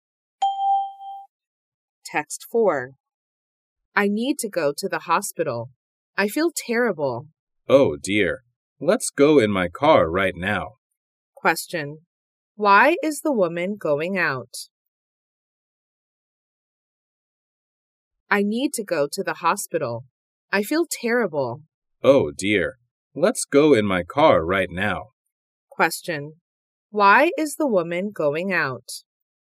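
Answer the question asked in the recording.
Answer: She feels terrible and needs to go to the hospital.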